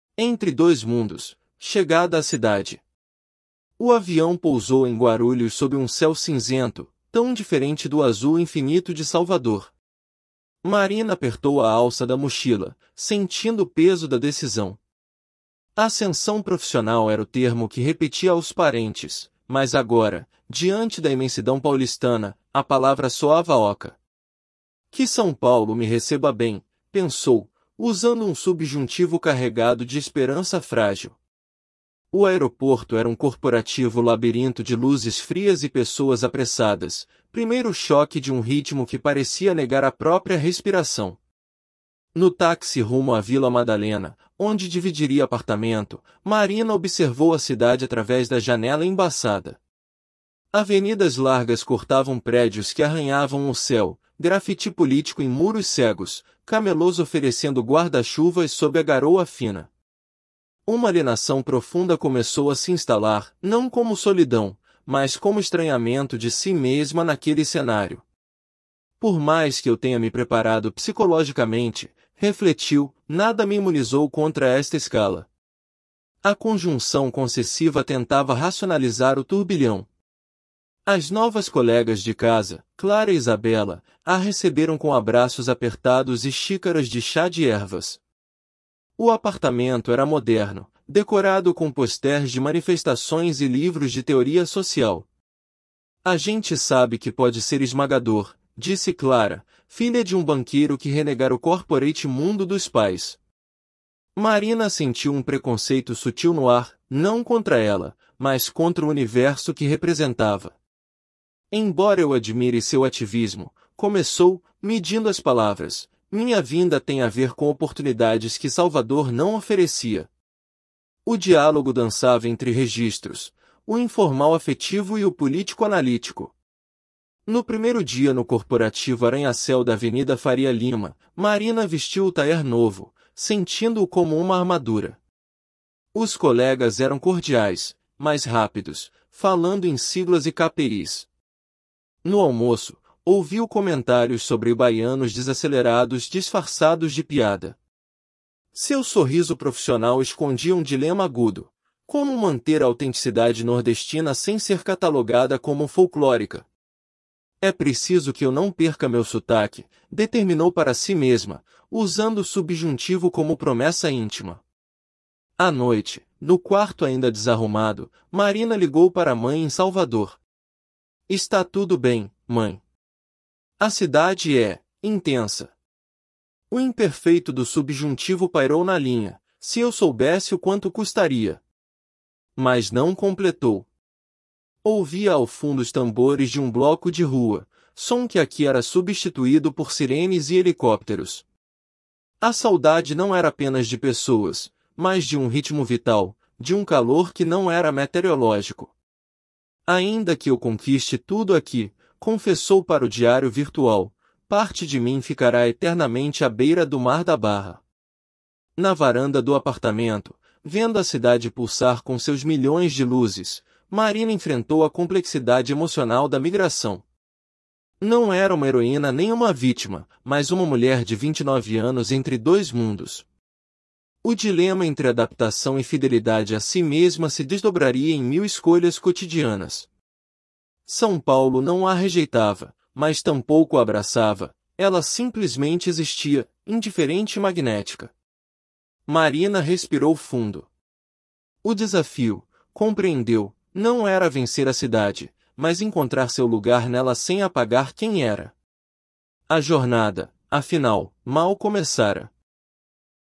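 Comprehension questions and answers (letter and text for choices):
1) Por que a palavra 'ascensão' soa oca para Marina ao chegar em São Paulo?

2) Como a 'alienação' que Marina sente se diferencia da solidão comum?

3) Qual é a natureza do 'preconceito sutil' que Marina percebe no apartamento?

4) Qual dilema profissional Marina enfrenta no ambiente corporativo de São Paulo?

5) O que a saudade de Marina representa além da falta de pessoas?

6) Qual é a conclusão final de Marina sobre seu desafio em São Paulo?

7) Qual função linguística Marina usa ao pensar 'Que São Paulo me receba bem' e 'É preciso que eu não perca meu sotaque'?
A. Indicativo para descrever fatos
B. Subjuntivo para expressar desejos e emoções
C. Imperativo para dar ordens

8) Como São Paulo é descrita em relação à chegada de Marina?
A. Como uma cidade que a rejeita ativamente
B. Como um lugar que a abraça calorosamente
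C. Como uma entidade indiferente que simplesmente existe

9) Qual é o significado do 'calor' que Marina sente falta, segundo o texto?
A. Apenas a temperatura mais alta de Salvador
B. Exclusivamente o afeto familiar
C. Uma qualidade vital que inclui ritmo e conexão humana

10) Qual contraste é estabelecido entre os sons de Salvador e São Paulo?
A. Tambores vs. sirenes e helicópteros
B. Silêncio vs. barulho constante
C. Música clássica vs. música popular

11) Como as colegas de apartamento caracterizam seu ambiente doméstico?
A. Como um espaço corporativo e impessoal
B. Como um ambiente decorado com posters de manifestações e livros de teoria social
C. Como um lugar folclórico com elementos nordestinos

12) Qual é a relação de Clara com seu background familiar?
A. Ela segue carreira corporativa como seus pais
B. Ela rejeita o mundo corporativo dos pais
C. Ela ignora completamente suas origens familiares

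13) Marina se sente completamente preparada psicologicamente para a mudança para São Paulo.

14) O apartamento na Vila Madalena é decorado com elementos que refletem engajamento político e social.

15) Marina pretende abandonar completamente seu sotaque nordestino para se adaptar a São Paulo.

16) A migração de Marina é retratada como uma escolha entre ser heroína ou vítima.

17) As piadas sobre 'baianos desacelerados' no ambiente de trabalho são recebidas por Marina com naturalidade.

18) Marina percebe que sua jornada em São Paulo mal começou e será composta de muitas escolhas cotidianas.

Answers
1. Porque, diante da imensidão paulistana, sente o peso da decisão
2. É um estranhamento de si mesma naquele cenário
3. Não é contra ela, mas contra o universo (corporativo) que ela representa
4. Como manter a autenticidade nordestina sem ser catalogada como folclórica
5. A falta de um ritmo vital, de um calor que não era meteorológico
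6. O desafio não era vencer a cidade, mas encontrar seu lugar nela sem apagar quem era
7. B. Subjuntivo para expressar desejos e emoções
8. C. Como uma entidade indiferente que simplesmente existe
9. C. Uma qualidade vital que inclui ritmo e conexão humana
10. A. Tambores vs. sirenes e helicópteros
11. B. Como um ambiente decorado com posters de manifestações e livros de teoria social
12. B. Ela rejeita o mundo corporativo dos pais
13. False
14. True
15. False
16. False
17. False
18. True

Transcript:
Chegada à Cidade – TEST
Chegada à Cidade
O avião pousou em Guarulhos sob um céu cinzento, tão diferente do azul infinito de Salvador. Marina apertou a alça da mochila, sentindo o peso da decisão. Ascensão profissional era o termo que repetia aos parentes, mas agora, diante da imensidão paulistana, a palavra soava oca. 'Que São Paulo me receba bem', pensou, usando um subjuntivo carregado de esperança frágil. 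O aeroporto era um corporativo labirinto de luzes frias e pessoas apressadas, primeiro choque de um ritmo que parecia negar a própria respiração.
No táxi rumo à Vila Madalena, onde dividiria apartamento, Marina observou a cidade através da janela embaçada. Avenidas largas cortavam prédios que arranhavam o céu, graffiti político em muros cegos, camelôs oferecendo guarda-chuvas sob a garoa fina. Uma alienação profunda começou a se instalar, não como solidão, mas como estranhamento de si mesma naquele cenário. 'Por mais que eu tenha me preparado psicologicamente', refletiu, 'nada me imunizou contra esta escala'. A conjunção concessiva tentava racionalizar o turbilhão.
As novas colegas de casa, Clara e Isabela, a receberam com abraços apertados e xícaras de chá de ervas. O apartamento era moderno, decorado com posters de manifestações e livros de teoria social. 'A gente sabe que pode ser esmagador', disse Clara, filha de um banqueiro que renegara o corporate mundo dos pais. 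Marina sentiu um preconceito sutil no ar, não contra ela, mas contra o universo que representava. 'Embora eu admire seu ativismo', começou, medindo as palavras, 'minha vinda tem a ver com oportunidades que Salvador não oferecia'. O diálogo dançava entre registros: o informal afetivo e o político-analítico.
No primeiro dia no corporativo arranha-céu da Avenida Faria Lima, Marina vestiu o tailleur novo, sentindo-o como uma armadura. Os colegas eram cordiais, mas rápidos, falando em siglas e KPIs. No almoço, ouviu comentários sobre 'baianos desacelerados' disfarçados de piada. Seu sorriso profissional escondia um dilema agudo: como manter a autenticidade nordestina sem ser catalogada como folclórica? 'É preciso que eu não perca meu sotaque', determinou para si mesma, usando o subjuntivo como promessa íntima.
À noite, no quarto ainda desarrumado, Marina ligou para a mãe em Salvador. 'Está tudo bem, mãe. 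A cidade é... intensa.' O imperfeito do subjuntivo pairou na linha: 'Se eu soubesse o quanto custaria...' Mas não completou. Ouvia ao fundo os tambores de um bloco de rua, som que aqui era substituído por sirenes e helicópteros. A saudade não era apenas de pessoas, mas de um ritmo vital, de um calor que não era metereológico. 'Ainda que eu conquiste tudo aqui', confessou para o diário virtual, 'parte de mim ficará eternamente à beira do mar da Barra.'
Na varanda do apartamento, vendo a cidade pulsar com seus milhões de luzes, Marina enfrentou a complexidade emocional da migração. Não era uma heroína nem uma vítima, mas uma mulher de 29 anos entre dois mundos. O dilema entre adaptação e fidelidade a si mesma se desdobraria em mil escolhas cotidianas. São Paulo não a rejeitava, mas tampouco a abraçava; ela simplesmente existia, indiferente e magnética. Marina respirou fundo. O desafio, compreendeu, não era vencer a cidade, mas encontrar seu lugar nela sem apagar quem era. 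A jornada, afinal, mal começara.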